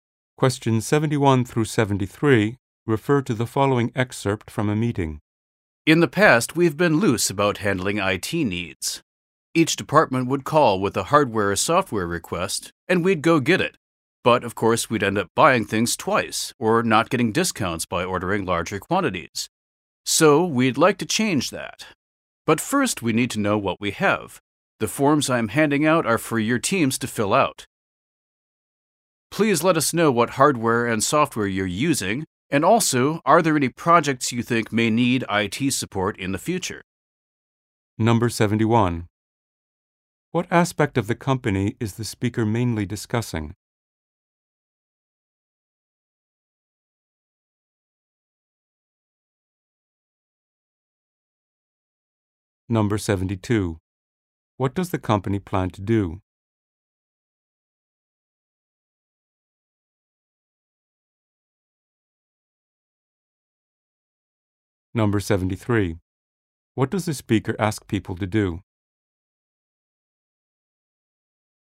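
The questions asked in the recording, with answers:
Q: What aspect of the company is the speaker mainly discussing?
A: How it handles IT purchases

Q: What does the company plan to do?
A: Change how IT needs are bought to avoid duplicates and get bulk discounts

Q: What does the speaker ask people to do?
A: Fill out forms listing their hardware, software and future IT needs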